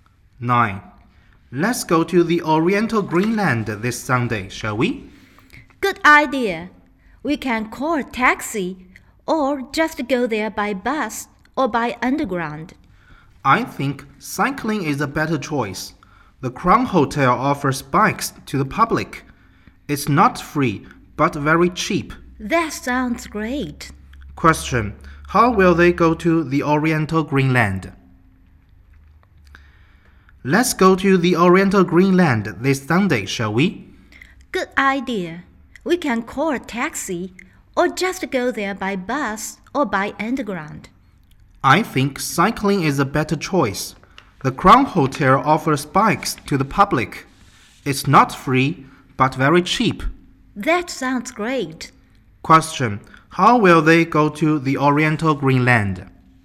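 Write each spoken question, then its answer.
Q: How will they go to the Oriental Greenland?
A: By bike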